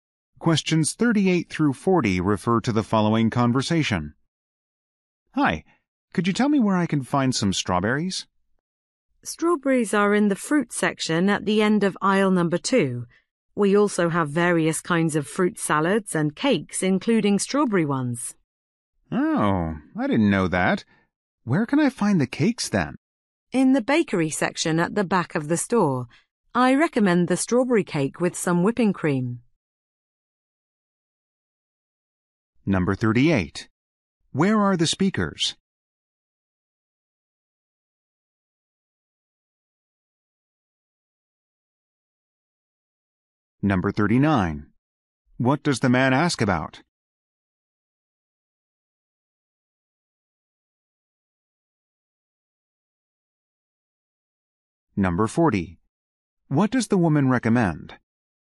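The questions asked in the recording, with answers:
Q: Where are the speakers?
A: In a grocery store

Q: What does the man ask about?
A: Where to find strawberries

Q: What does the woman recommend?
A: The strawberry cake with whipping cream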